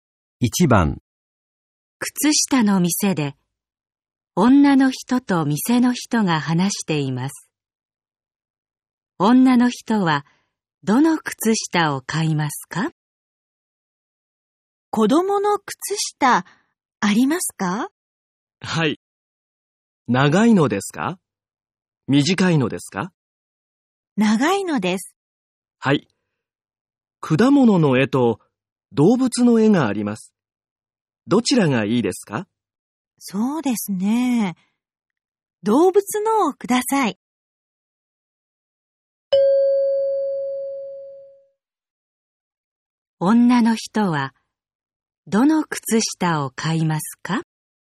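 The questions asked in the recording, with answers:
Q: 女の人は、どの靴下を買いますか?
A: 子供の長い、動物の絵の靴下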